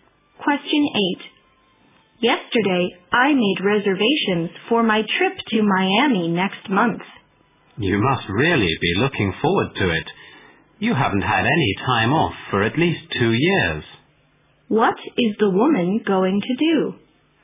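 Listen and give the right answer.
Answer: Take a vacation trip to Miami next month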